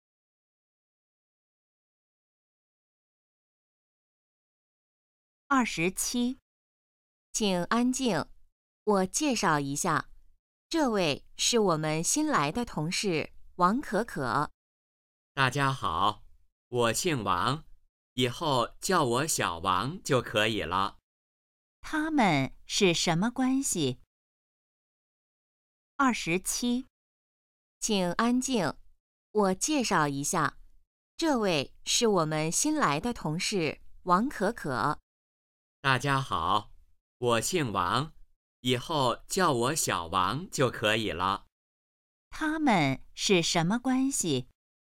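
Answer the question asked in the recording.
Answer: 同事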